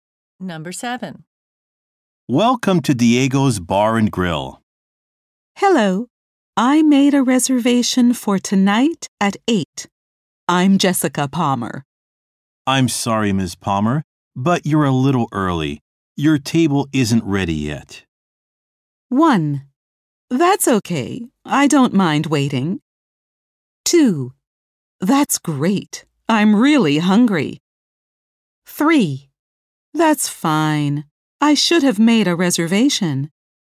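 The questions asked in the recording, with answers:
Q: Your table isn't ready yet.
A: 1: That's okay. I don't mind waiting.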